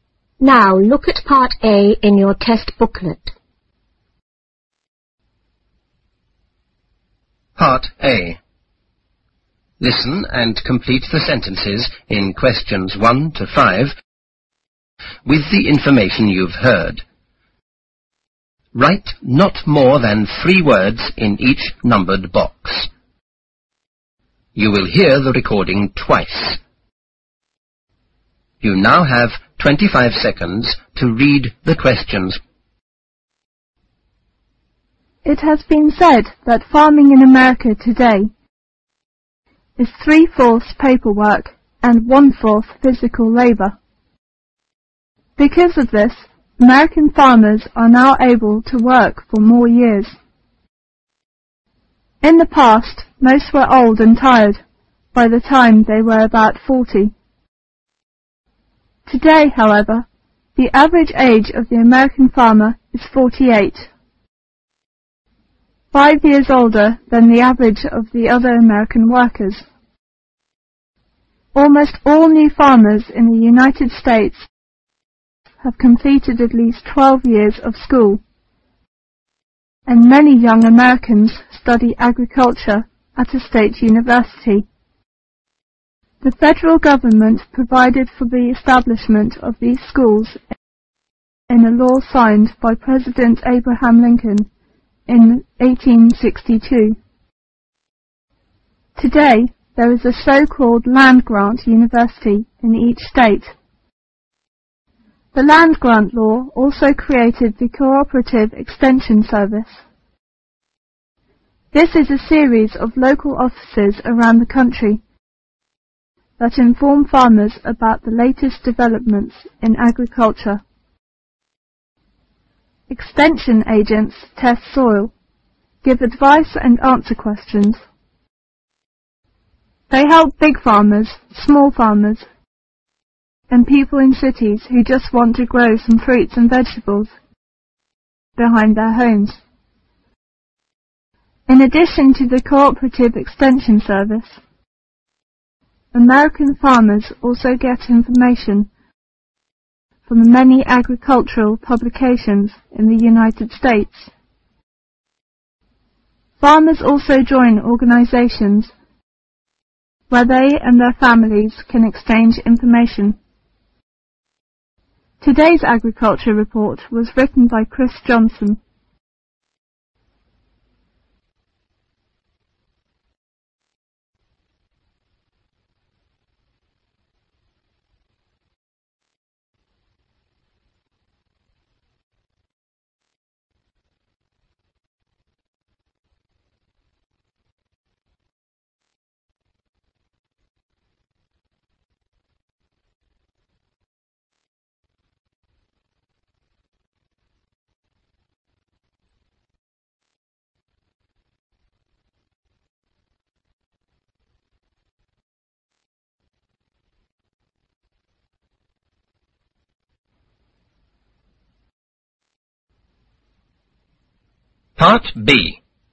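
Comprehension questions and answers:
Listen and complete the sentences in questions 1-5.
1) and one-fourth ( )labor.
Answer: physical

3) Many young Americans study agriculture at a ( ) university.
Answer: state

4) The land-grant law created the co-operative ( ).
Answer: extension service

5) the ( )of the agriculture schools was signed by President Abraham Lincoln.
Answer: establishment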